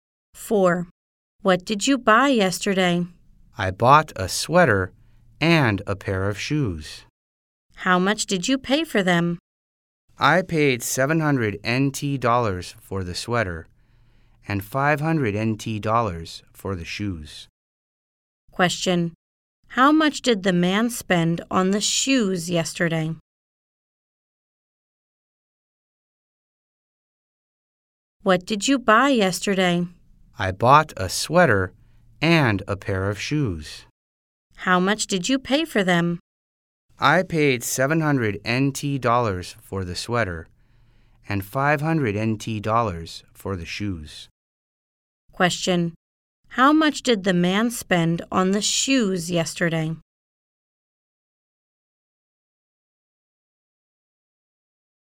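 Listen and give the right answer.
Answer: $500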